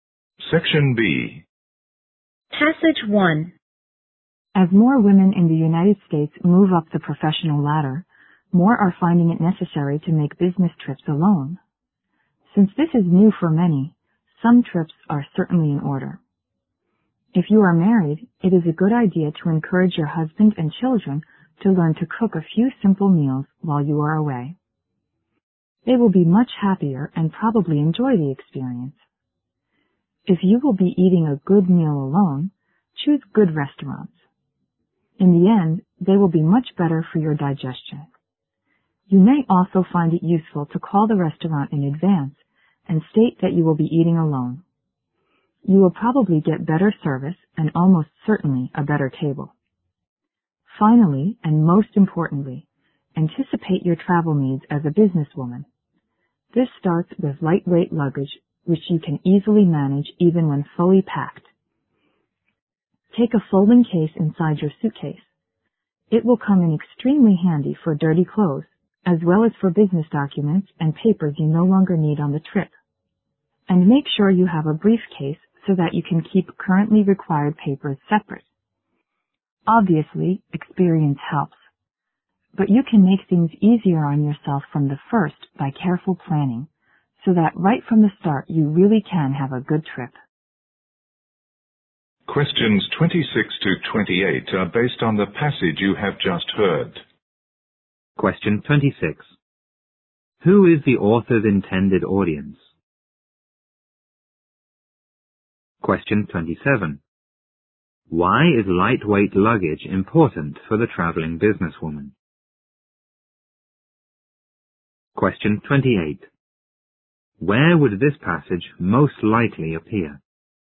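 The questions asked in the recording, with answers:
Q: Who is the author's intended audience?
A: Businesswomen who travel alone

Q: Why is lightweight luggage important for the traveling businesswoman?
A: She can easily manage it even when it is fully packed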